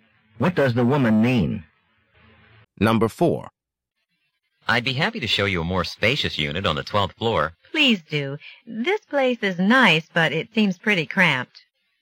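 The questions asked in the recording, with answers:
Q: What does the woman imply?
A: She would like to see a bigger unit because this one is too small.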